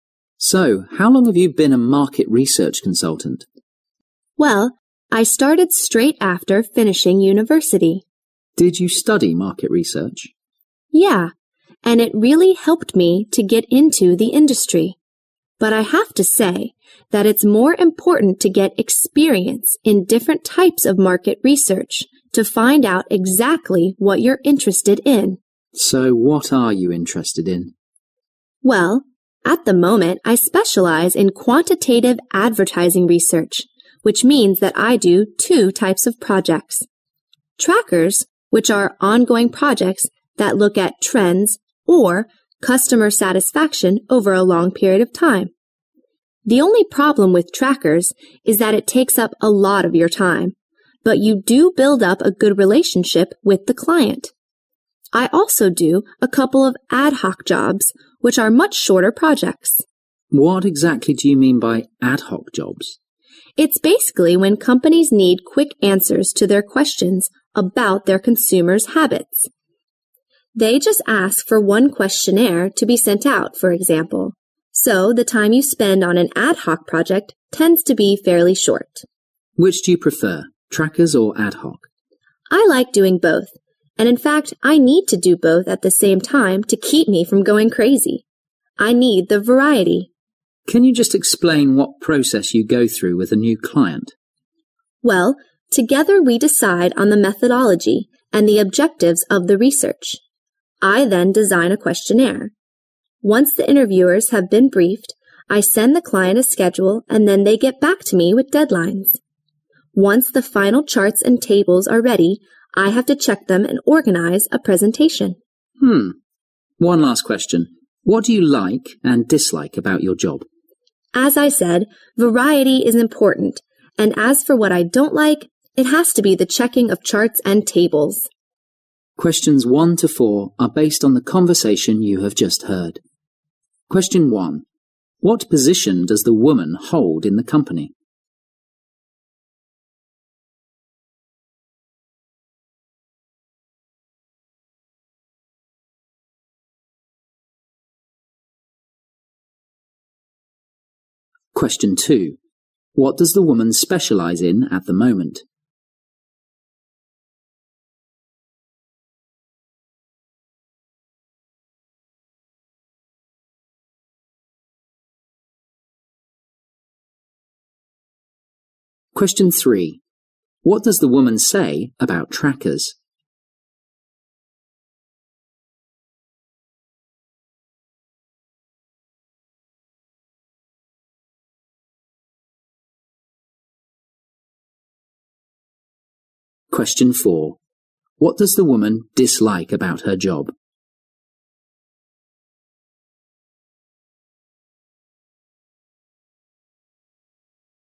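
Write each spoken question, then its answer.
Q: What position does the woman hold in the company?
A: Market research consultant

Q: What does the woman specialize in at the moment?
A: Quantitative advertising research

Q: What does the woman say about trackers?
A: They take up a lot of time but build a good relationship with the client

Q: What does the woman dislike about her job?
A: Checking charts and tables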